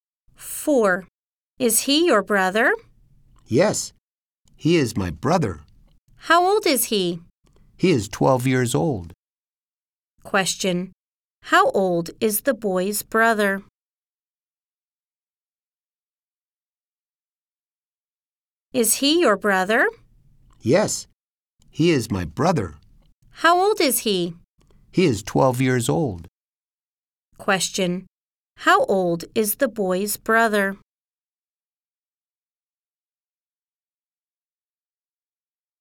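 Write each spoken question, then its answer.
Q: How old is the boy's brother?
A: 12 years old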